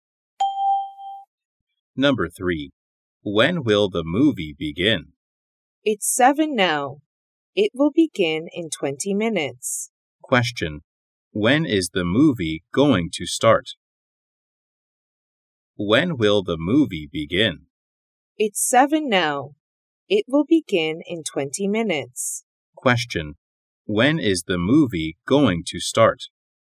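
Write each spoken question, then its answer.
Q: When is the movie going to start?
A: At 7:20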